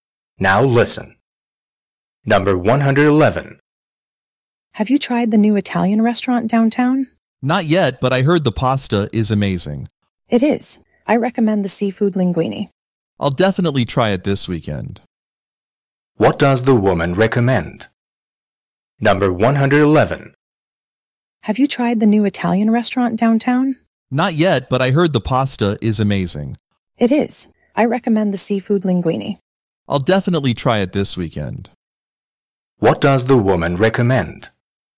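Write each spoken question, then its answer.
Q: What does the woman recommend?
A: The seafood linguine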